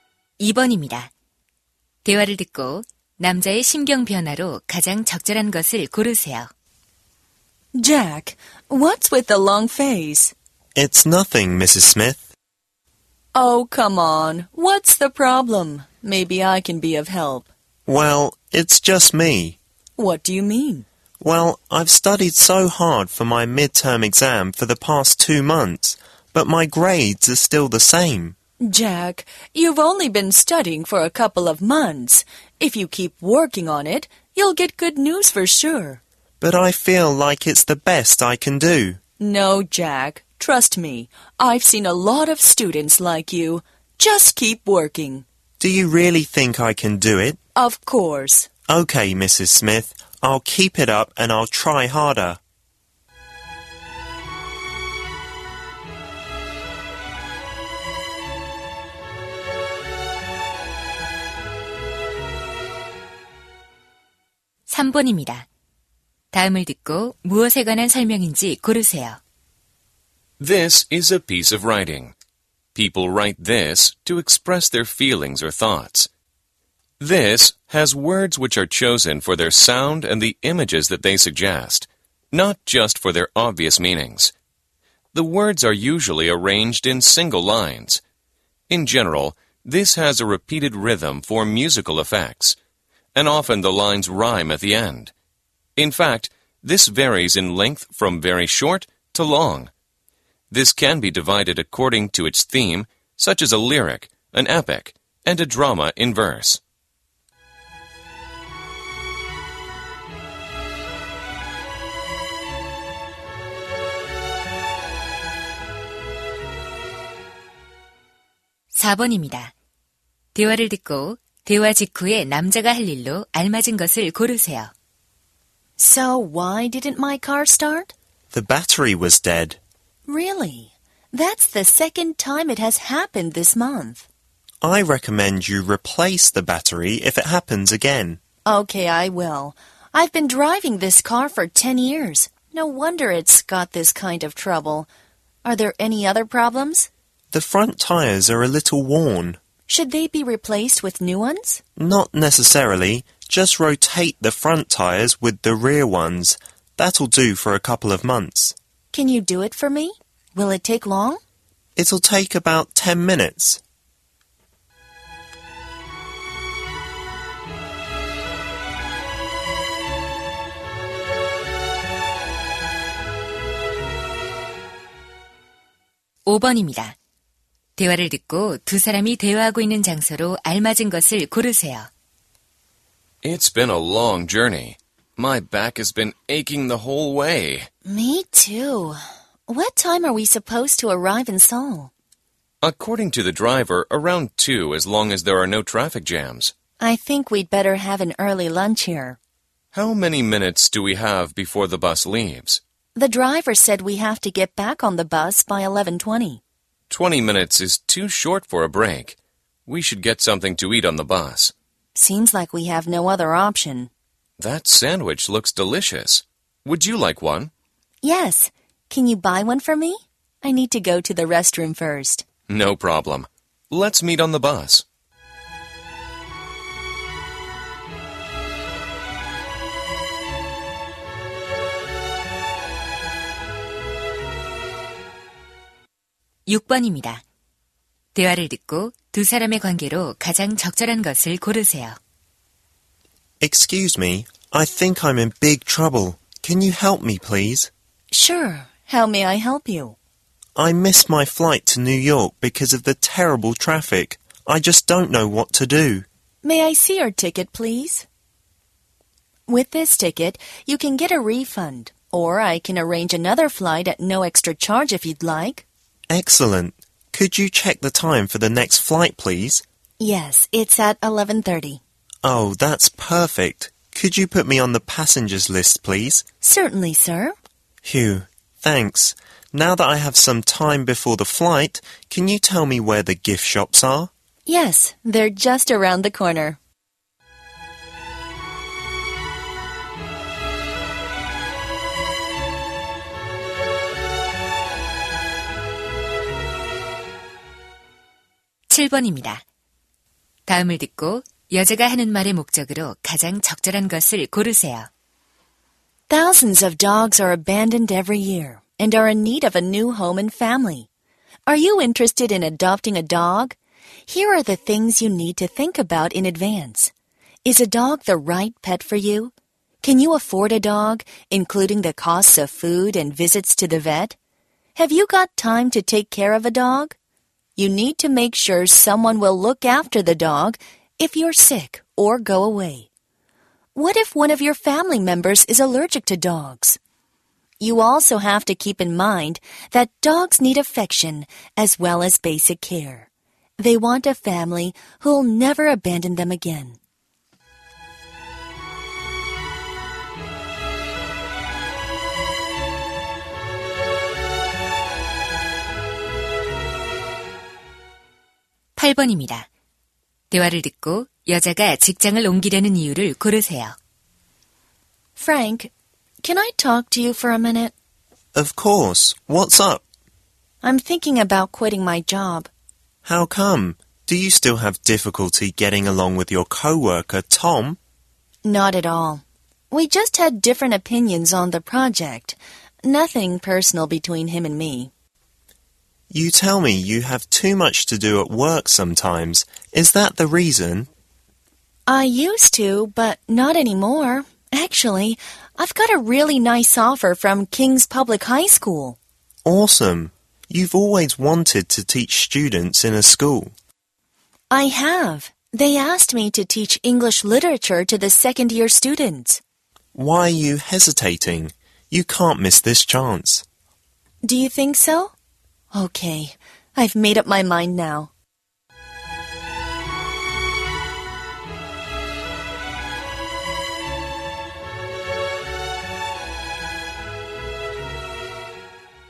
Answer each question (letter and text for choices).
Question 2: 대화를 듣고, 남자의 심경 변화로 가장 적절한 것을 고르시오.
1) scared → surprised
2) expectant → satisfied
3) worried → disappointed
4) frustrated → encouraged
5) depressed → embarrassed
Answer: 4) frustrated → encouraged

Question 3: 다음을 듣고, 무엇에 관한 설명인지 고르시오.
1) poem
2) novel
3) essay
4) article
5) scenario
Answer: 1) poem

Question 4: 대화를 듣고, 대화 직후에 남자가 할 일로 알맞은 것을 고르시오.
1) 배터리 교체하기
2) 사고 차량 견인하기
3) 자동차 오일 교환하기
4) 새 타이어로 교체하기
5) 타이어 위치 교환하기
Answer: 5) 타이어 위치 교환하기

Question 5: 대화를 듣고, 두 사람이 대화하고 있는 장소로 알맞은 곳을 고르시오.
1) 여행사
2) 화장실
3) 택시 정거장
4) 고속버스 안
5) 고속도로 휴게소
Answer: 5) 고속도로 휴게소

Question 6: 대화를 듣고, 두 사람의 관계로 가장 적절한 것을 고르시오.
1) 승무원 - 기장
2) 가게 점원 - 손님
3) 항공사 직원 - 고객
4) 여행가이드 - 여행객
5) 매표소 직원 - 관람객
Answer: 3) 항공사 직원 - 고객

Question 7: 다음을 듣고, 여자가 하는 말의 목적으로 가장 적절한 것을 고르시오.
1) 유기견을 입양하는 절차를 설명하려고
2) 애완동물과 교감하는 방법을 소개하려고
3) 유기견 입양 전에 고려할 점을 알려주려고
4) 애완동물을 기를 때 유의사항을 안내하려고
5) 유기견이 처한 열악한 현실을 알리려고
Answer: 3) 유기견 입양 전에 고려할 점을 알려주려고

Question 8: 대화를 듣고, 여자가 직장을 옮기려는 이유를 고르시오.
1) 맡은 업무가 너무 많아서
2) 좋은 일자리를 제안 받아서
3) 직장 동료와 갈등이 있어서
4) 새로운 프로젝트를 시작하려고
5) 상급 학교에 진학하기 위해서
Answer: 2) 좋은 일자리를 제안 받아서

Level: 고2